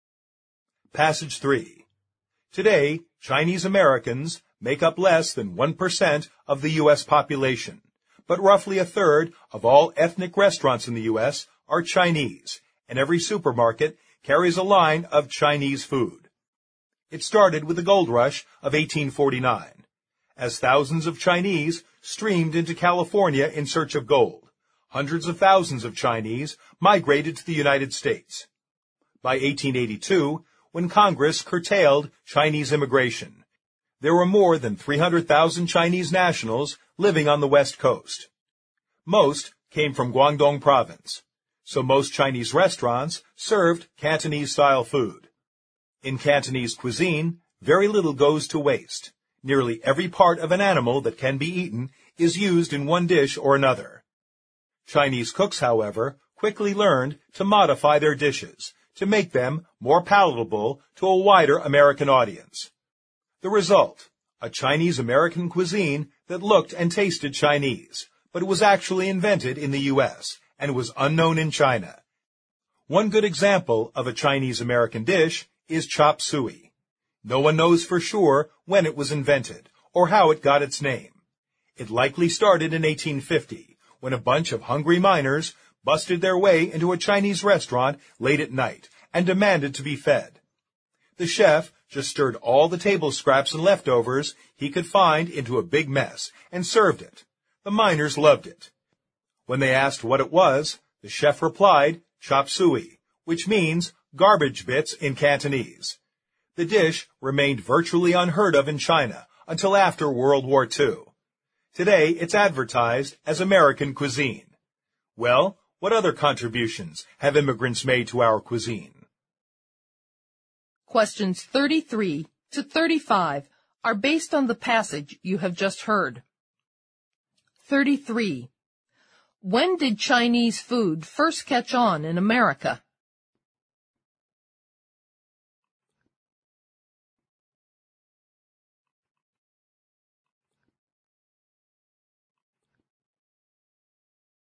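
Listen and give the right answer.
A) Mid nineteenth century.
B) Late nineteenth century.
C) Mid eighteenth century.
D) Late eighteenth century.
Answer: A) Mid nineteenth century.

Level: 六级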